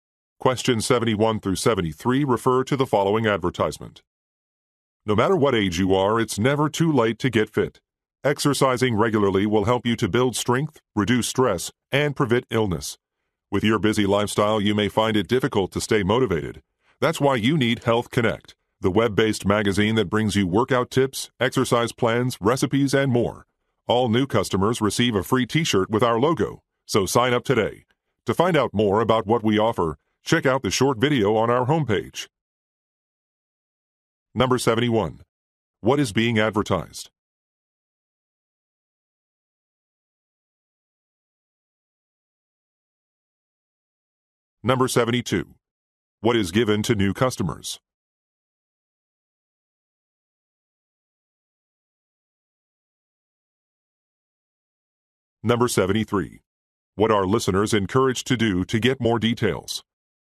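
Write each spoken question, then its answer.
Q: What is being advertised?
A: A web-based fitness magazine (Health Connect)

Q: What is given to new customers?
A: A free t-shirt with the logo

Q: What are listeners encouraged to do to get more details?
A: Watch the short video on the homepage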